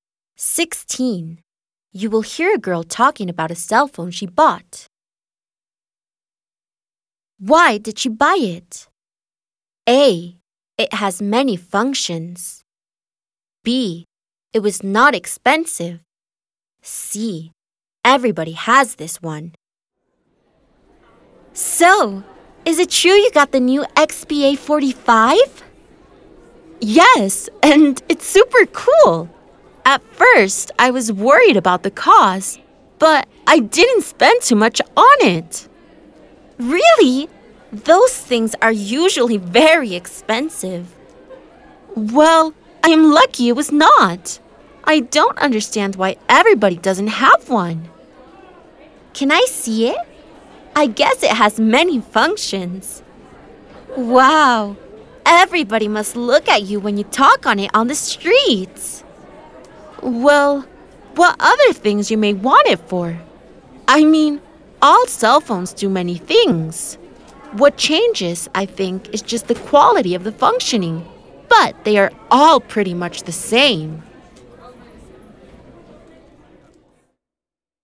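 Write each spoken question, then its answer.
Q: Why did she buy it?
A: B: It was not expensive.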